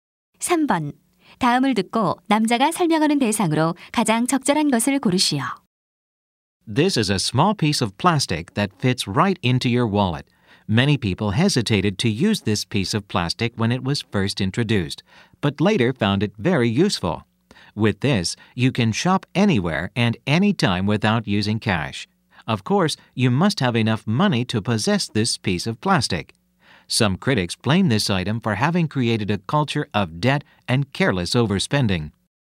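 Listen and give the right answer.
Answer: 신용카드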